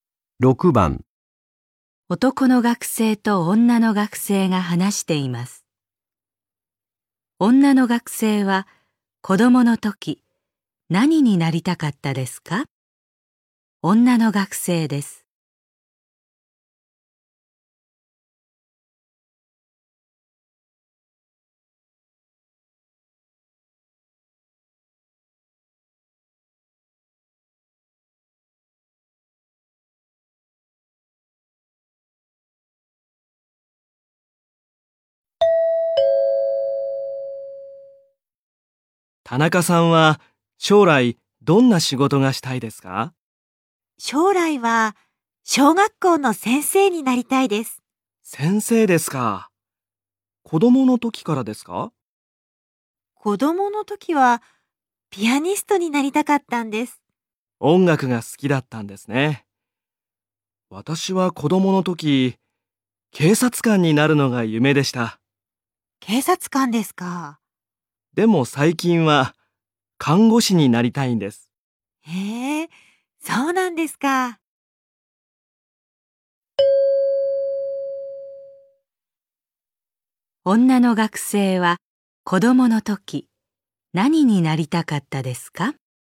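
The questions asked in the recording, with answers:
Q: 女の学生は子供の時何になりたかったですか?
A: ピアニスト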